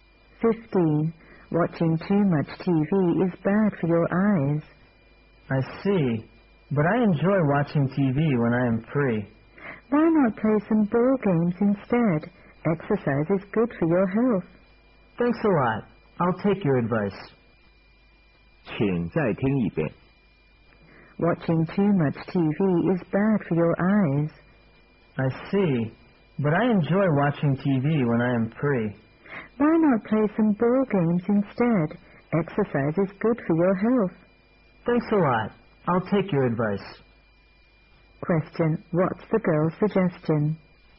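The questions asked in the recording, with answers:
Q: Question. What's the girl's suggestion?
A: Play some ball games instead of watching TV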